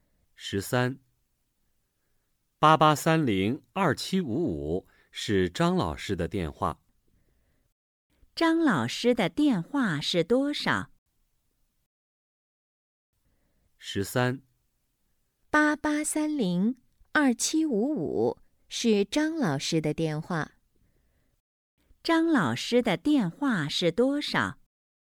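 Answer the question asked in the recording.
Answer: 88302755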